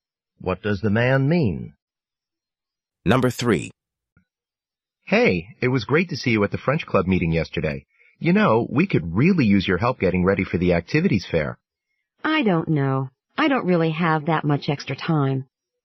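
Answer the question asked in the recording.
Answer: She may not be able to help get ready for the activities fair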